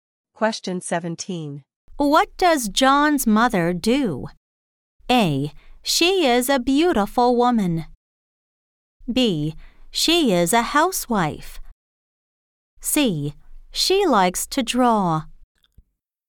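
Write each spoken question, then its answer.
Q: What does John's mother do?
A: B: She is a housewife.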